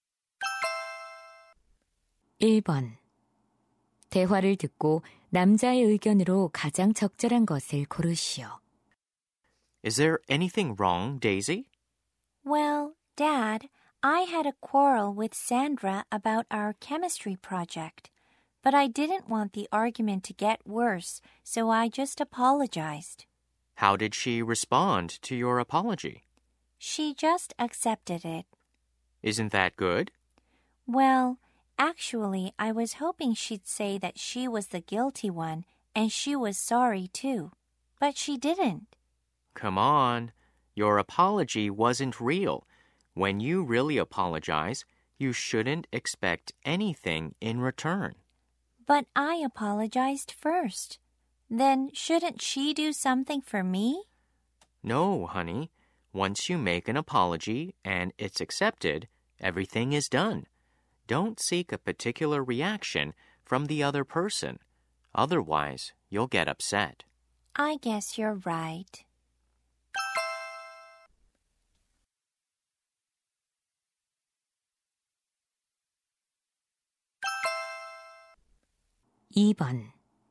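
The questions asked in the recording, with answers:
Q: 대화를 듣고 남자의 의견으로 가장 적절한 것을 고르시오.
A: 사과할 때는 상대방에게 보답이나 특정한 반응을 기대하지 말아야 한다.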